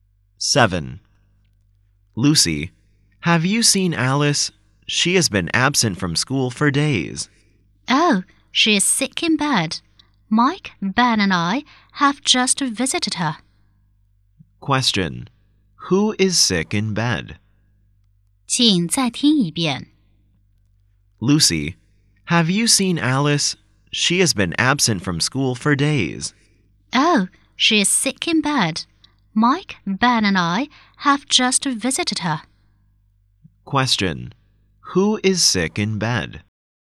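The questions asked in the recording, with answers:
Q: Who is sick in bed?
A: Alice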